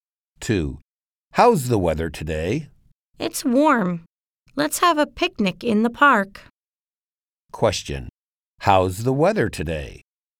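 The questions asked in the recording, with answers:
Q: How's the weather today?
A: It's warm.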